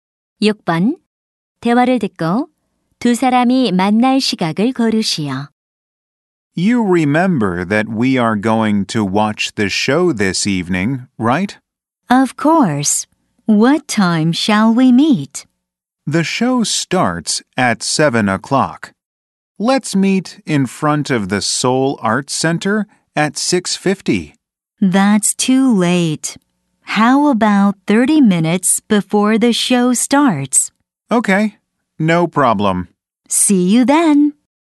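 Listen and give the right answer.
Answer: 6시 30분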